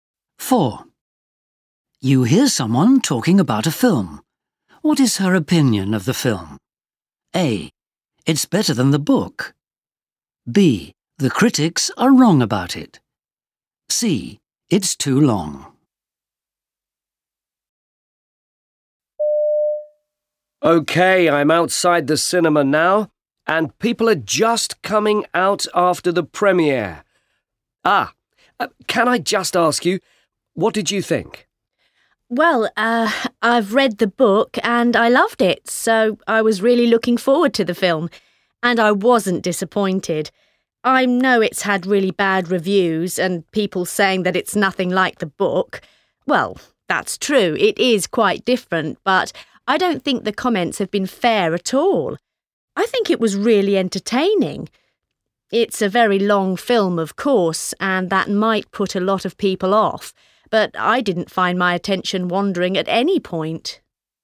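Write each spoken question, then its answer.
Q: What is her opinion of the film?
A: B: The critics are wrong about it.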